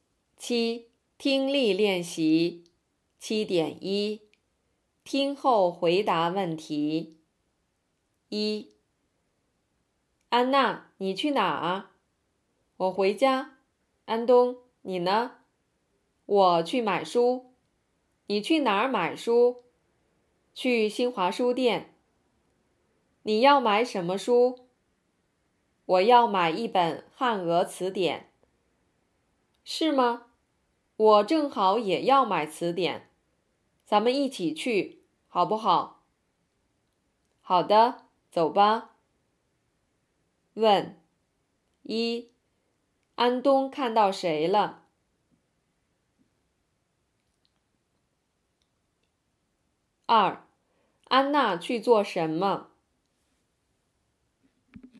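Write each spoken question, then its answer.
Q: 安东看到谁了?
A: 安娜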